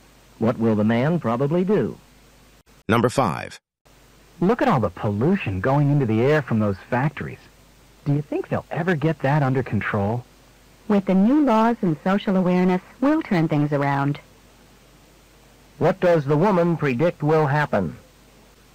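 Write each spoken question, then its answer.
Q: What does the woman predict will happen?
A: The pollution will be brought under control.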